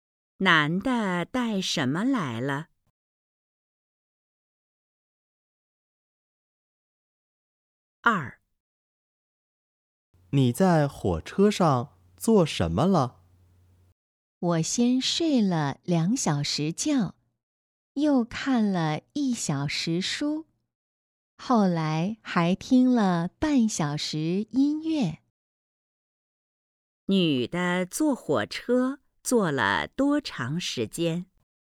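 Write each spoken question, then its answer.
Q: 女的坐火车坐了多长时间?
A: 三个半小时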